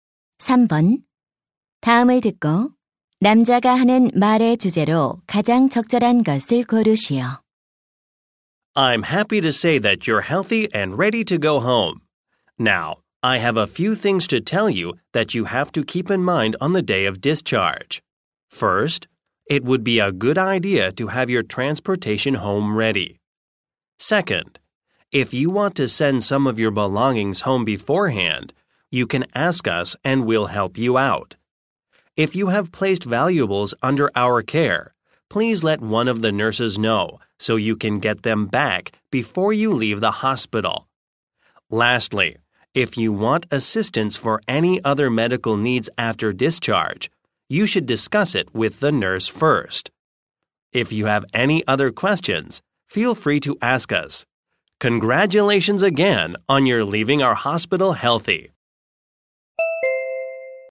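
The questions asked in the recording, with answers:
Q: 다음을 듣고 남자가 하는 말의 주제로 가장 적절한 것을 고르시오.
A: 퇴원할 때 유의할 사항 안내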